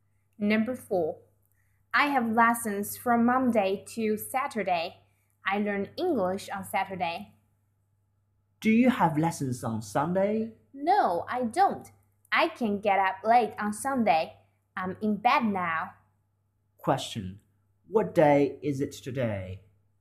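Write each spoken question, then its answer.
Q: Question. What day is it today?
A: Sunday.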